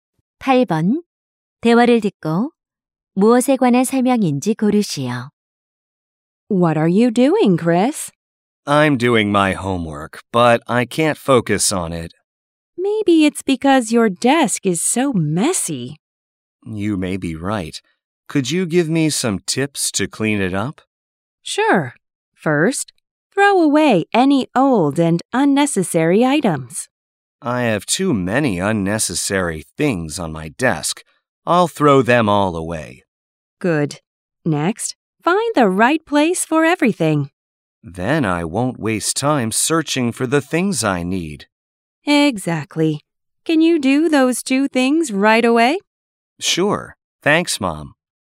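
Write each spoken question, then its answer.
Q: 대화를 듣고 무엇에 관한 설명인지 고르시오.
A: 책상 정리 방법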